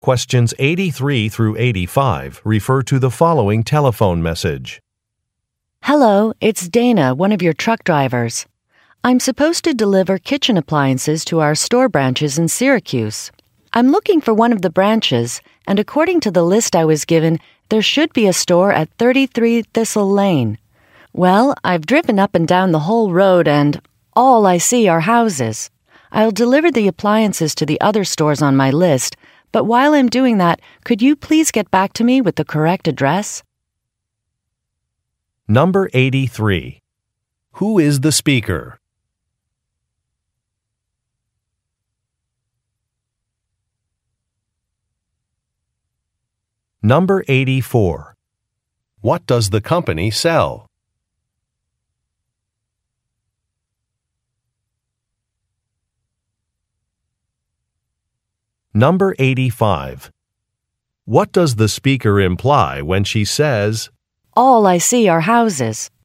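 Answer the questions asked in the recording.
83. A truck driver
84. Kitchen appliances
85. The store address she was given is wrong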